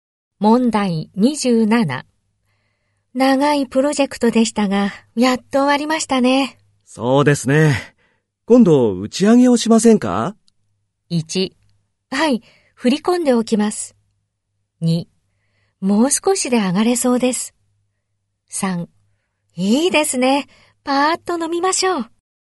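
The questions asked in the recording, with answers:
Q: 長いプロジェクトでしたが、やっと終わりましたね。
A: 3: いいですね。パーッと飲みましょう。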